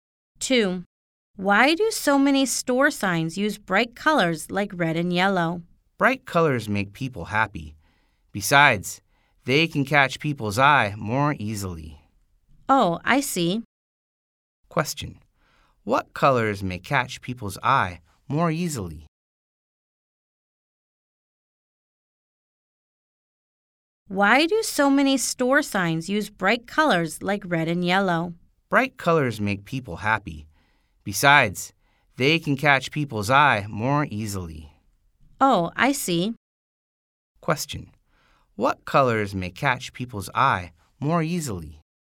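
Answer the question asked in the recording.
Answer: Bright colors like red and yellow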